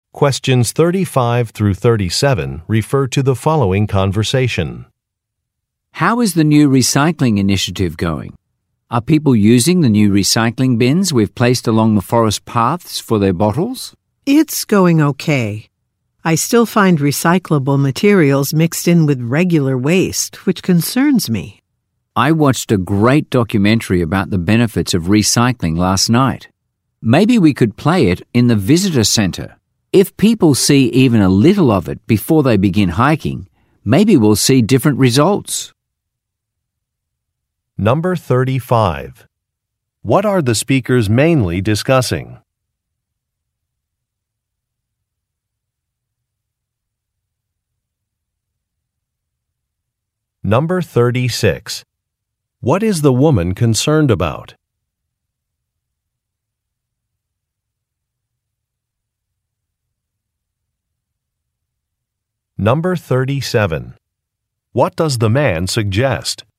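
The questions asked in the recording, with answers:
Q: What are the speakers mainly discussing?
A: A new recycling initiative

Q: What is the woman concerned about?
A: Recyclable materials being mixed in with regular waste

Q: What does the man suggest?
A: Showing a documentary about recycling in the visitor center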